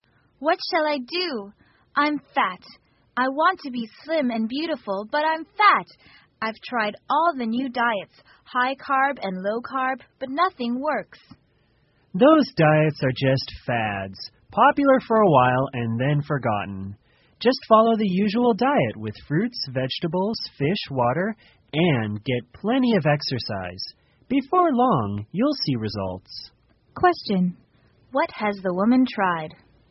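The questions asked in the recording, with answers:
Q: What has the woman tried?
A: All the new diets, high carb and low carb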